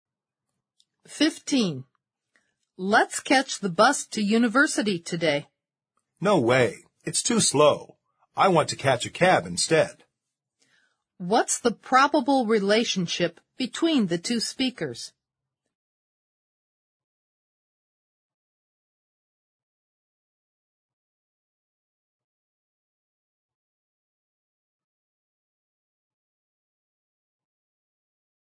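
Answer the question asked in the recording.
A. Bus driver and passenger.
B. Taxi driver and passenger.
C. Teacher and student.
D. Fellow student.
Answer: D. Fellow student.

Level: 四级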